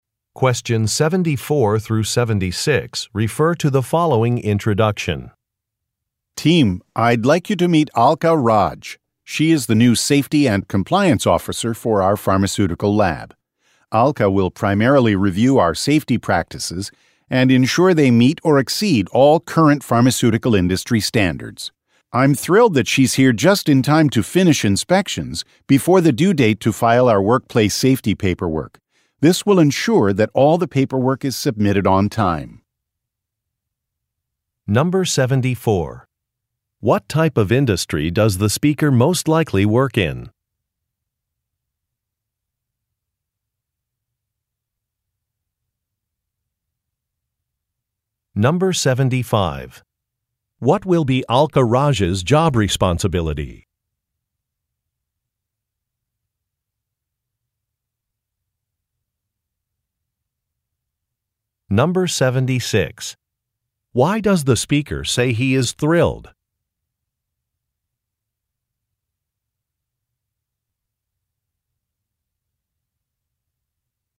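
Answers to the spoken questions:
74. Pharmaceuticals
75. Reviewing safety practices to make sure they meet industry standards
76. Alka arrived in time to finish the inspections before the safety paperwork is due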